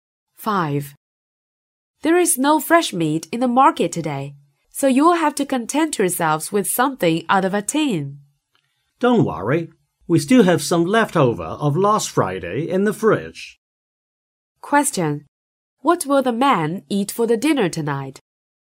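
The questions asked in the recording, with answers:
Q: What will the man eat for the dinner tonight?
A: Leftovers from last Friday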